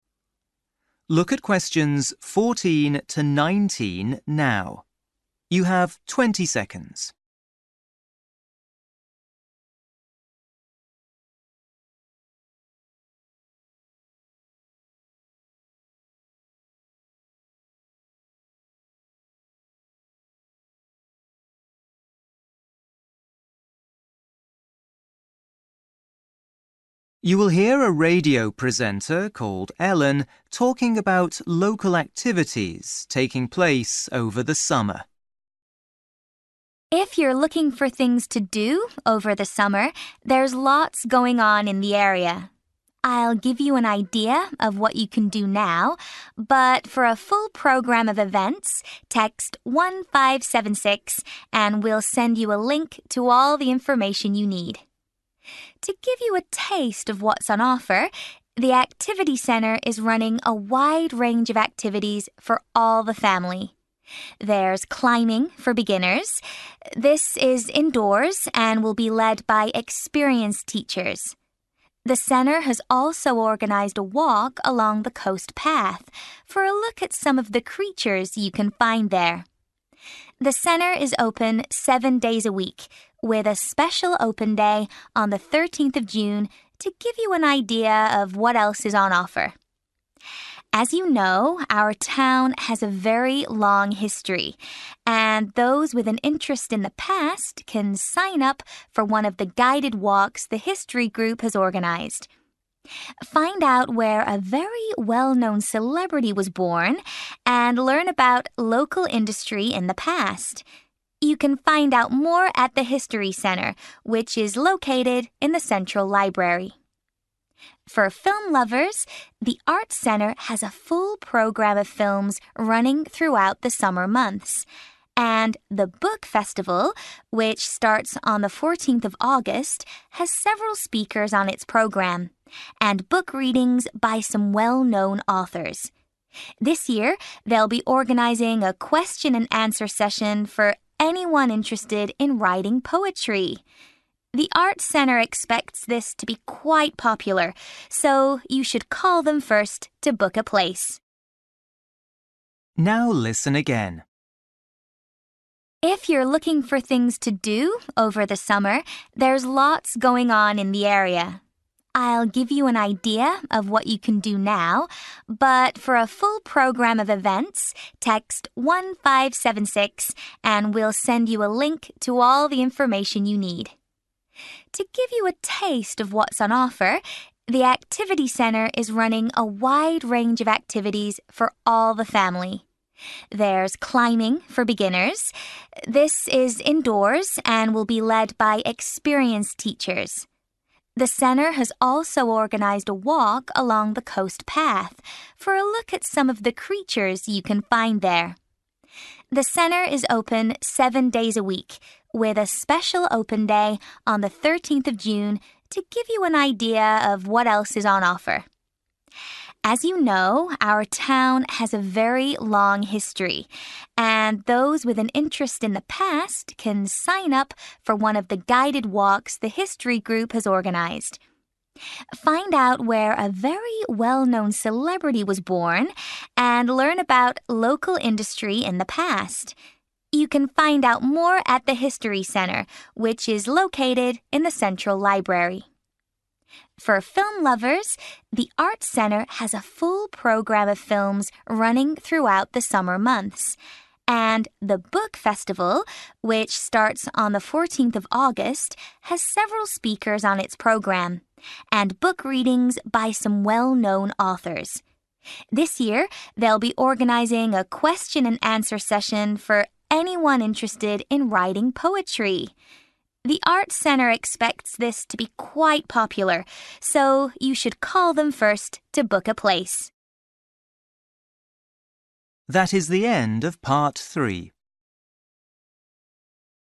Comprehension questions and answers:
For each question, write the correct answer in the gap. Write one or two words or a number or a date or a time.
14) For a full programme of events, text (14) ......................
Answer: 1576

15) The Activity Centre is running indoor (15) ...................... sessions for beginners.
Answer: climbing

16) There are also walks along the (16) ...................... to learn about the local wildlife.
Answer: coast path

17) The Activity Centre is running an open day on (17) ...................... June.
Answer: 13/13th

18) On the History Group walk you can learn about a famous (18) ...................... who was born in the area.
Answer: celebrity

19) If you're interested in writing (19) ...................... don't forget to book a place with the Arts Centre.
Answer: poetry

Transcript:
Ellen: If you're looking for things to do over the summer, there's lots going on in the area. I'll give you an idea of what you can do now, but for a full programme of events text 1576 and we'll send you a link to all the information you need.
To give you a taste of what's on offer, the Activity Centre is running a wide range of activities for all the family. There's climbing for beginners. This is indoors and will be led by experienced teachers. The centre has also organised a walk along the coast path for a look at some of the creatures you can find there. The centre is open seven days a week, with a special open day on the thirteenth of June to give you an idea of what else is on offer.
As you know, our town has a very long history, and those with an interest in the past can sign up for one of the guided walks the History Group has organised. Find out where a very well-known celebrity was born and learn about local industry in the past. You can find out more at the History Centre, which is located in the central library.
For film lovers, the Arts Centre has a full programme of films running throughout the summer months. And the Book Festival, which starts on the fourteenth of August, has several speakers on its programme and book readings by some well-known authors. This year they'll be organising a question and answer session for anyone interested in writing poetry. The Arts Centre expects this to be quite popular, so you should call them first to book a place.
Now listen again.

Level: PET (B1)